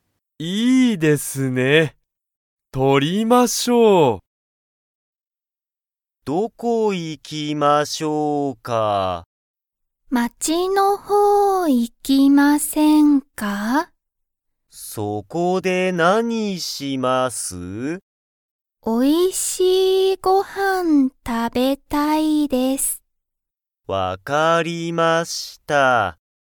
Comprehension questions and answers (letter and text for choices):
西山(にしやま)さんと日高(ひだか)さんは、____の方(ほう)へ行(い)く。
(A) 海(うみ)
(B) 街(まち)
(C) 写真(しゃしん)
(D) 車(くるま)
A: (B) 街(まち)

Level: Level 1